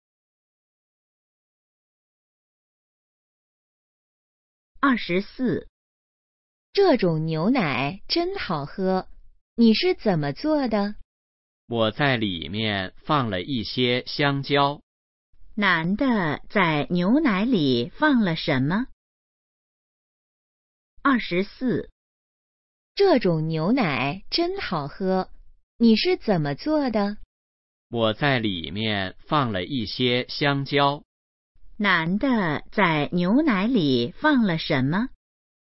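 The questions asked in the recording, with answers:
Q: 男的在牛奶里放了什么?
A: 香蕉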